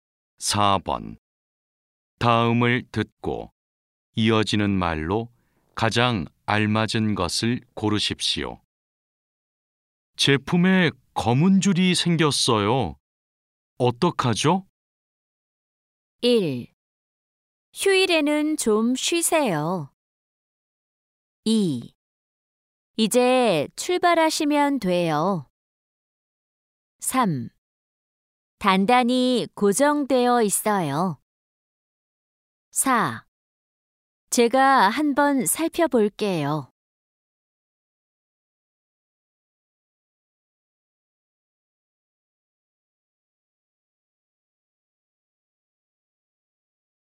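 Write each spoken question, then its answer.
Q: 제품에 검은 줄이 생겼어요. 어떡하죠?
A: 4: 제가 한번 살펴볼게요.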